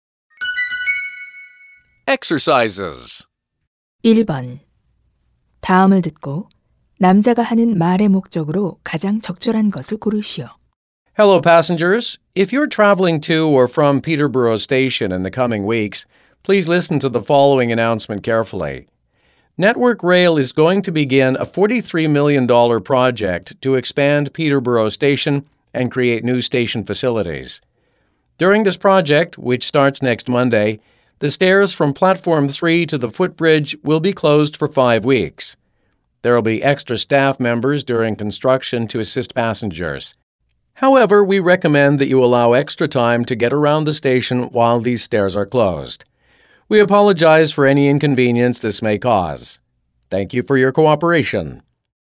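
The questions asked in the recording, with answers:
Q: 다음을 듣고 남자가 하는 말의 목적으로 가장 적절한 것을 고르시오.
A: 역 공사로 인한 계단 폐쇄를 안내하려고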